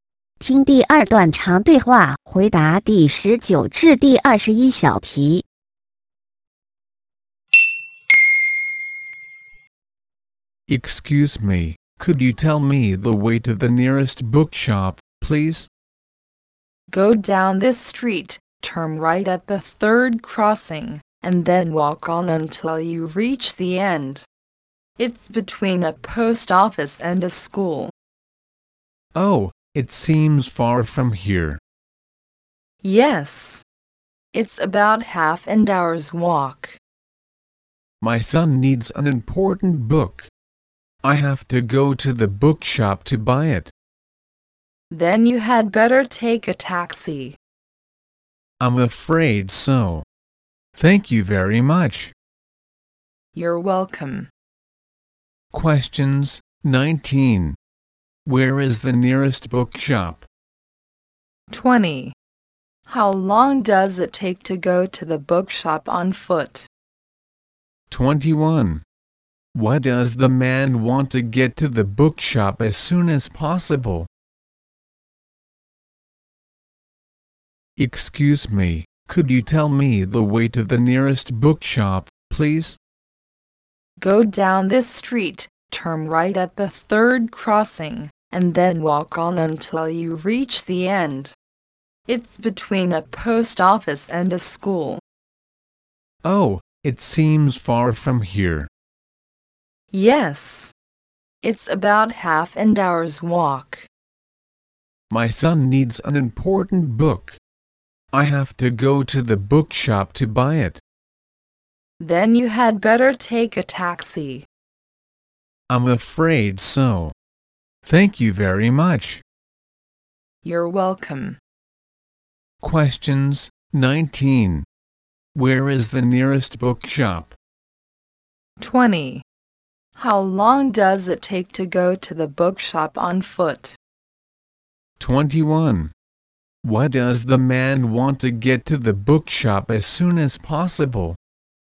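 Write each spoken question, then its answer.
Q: Where is the nearest bookshop?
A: Between a post office and a school

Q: How long does it take to go to the bookshop on foot?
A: About half an hour

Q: Why does the man want to get to the bookshop as soon as possible?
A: His son needs an important book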